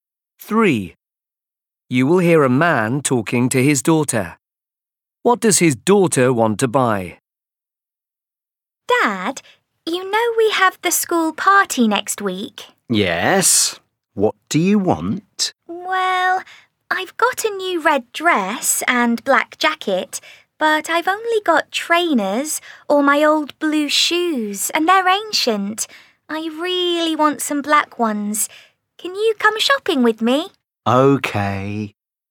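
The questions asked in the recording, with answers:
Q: What does his daughter want to buy?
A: black shoes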